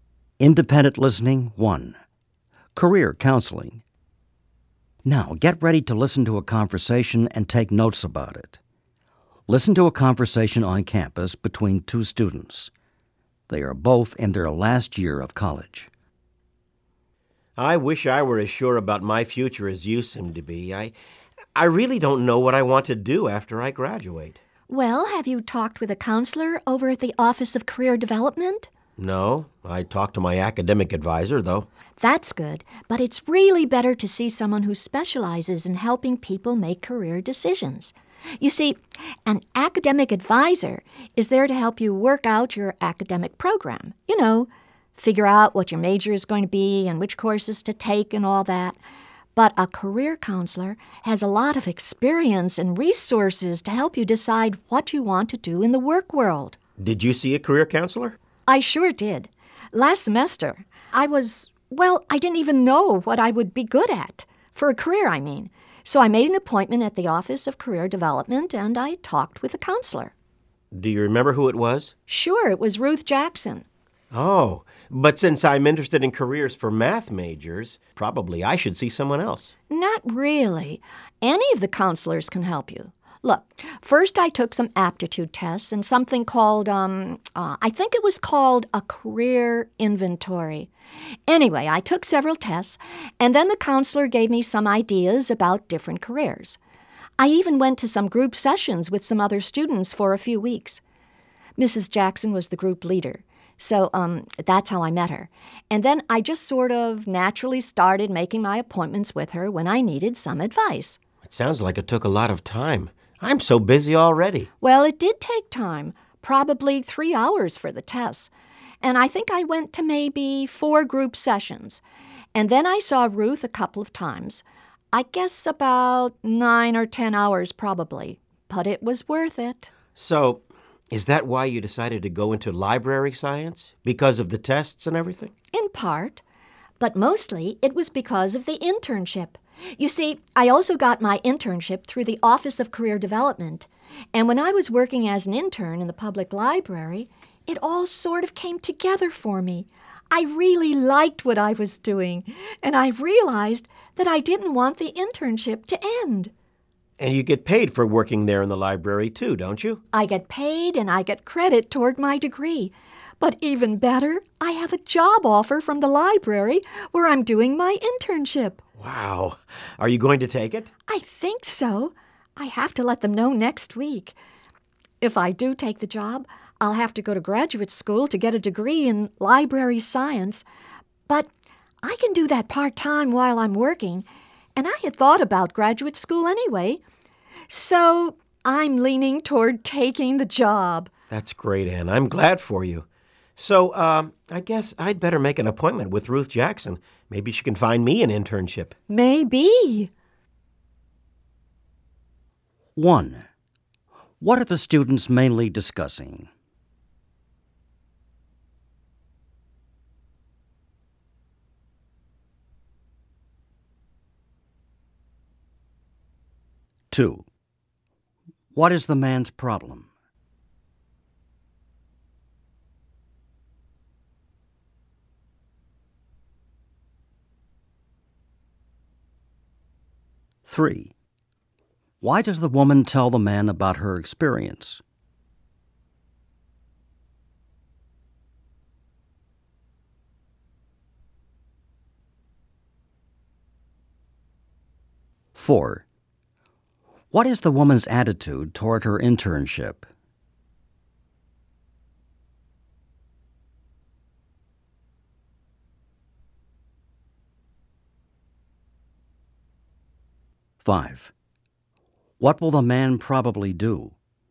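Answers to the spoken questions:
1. Getting career help from the Office of Career Development
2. He doesn't know what career he wants after graduating
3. To encourage him to see a career counselor
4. She likes it very much and wants to continue
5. Make an appointment with Ruth Jackson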